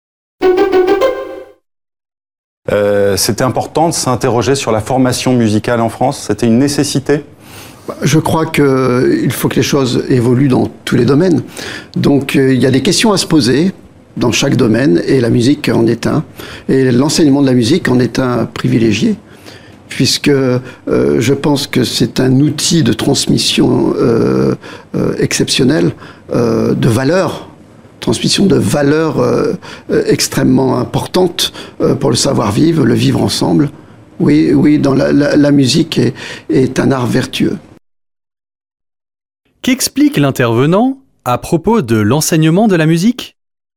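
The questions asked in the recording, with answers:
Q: Qu'explique l'intervenant à propos de l'enseignement de la musique ?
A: C'est un outil exceptionnel de transmission de valeurs, important pour le savoir-vivre et le vivre ensemble.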